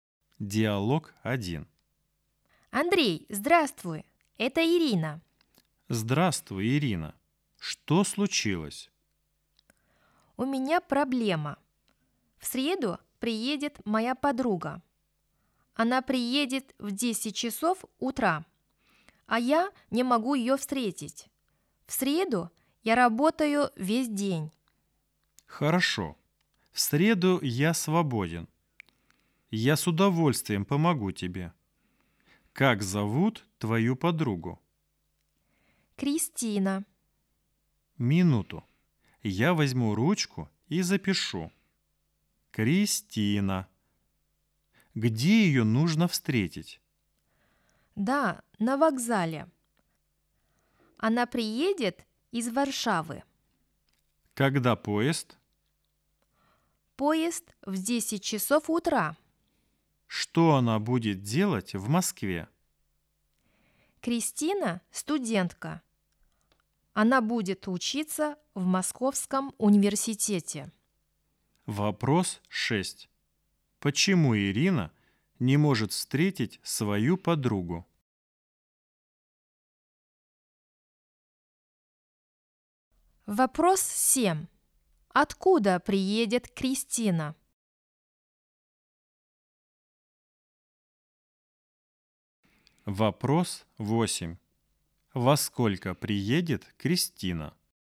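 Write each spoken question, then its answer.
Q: Почему Ирина не может встретить свою подругу?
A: В среду она работает весь день

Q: Откуда приедет Кристина?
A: из Варшавы

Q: Во сколько приедет Кристина?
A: в 10 часов утра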